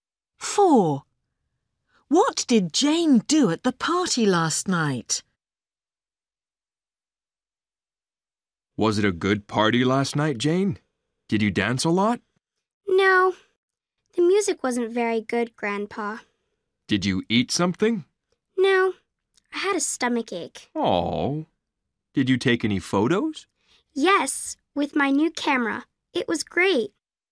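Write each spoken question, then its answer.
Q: What did Jane do at the party last night?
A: She took photos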